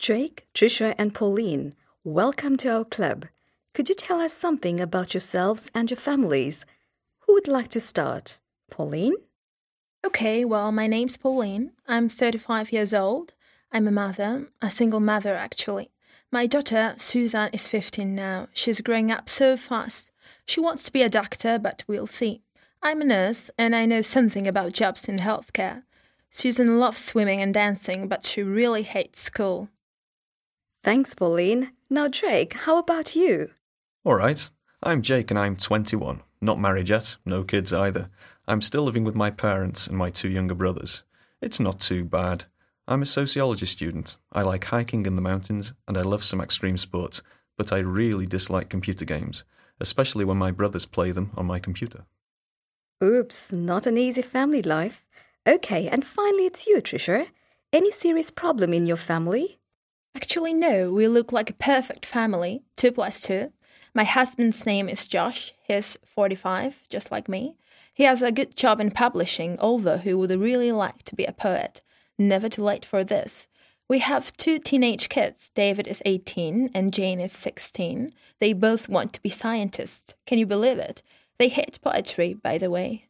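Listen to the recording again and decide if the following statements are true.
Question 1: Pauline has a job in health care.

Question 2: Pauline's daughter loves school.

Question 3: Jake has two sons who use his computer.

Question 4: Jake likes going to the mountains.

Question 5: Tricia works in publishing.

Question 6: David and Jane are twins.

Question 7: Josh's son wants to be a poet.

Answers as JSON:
{"1": "True", "2": "False", "3": "False", "4": "True", "5": "False", "6": "False", "7": "False"}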